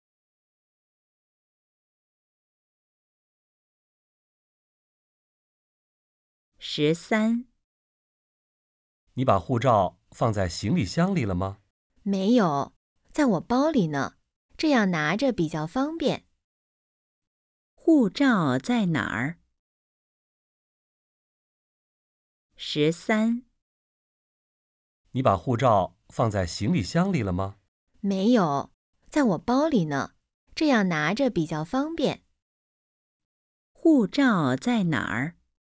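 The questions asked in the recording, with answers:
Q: 护照在哪儿?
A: 在包里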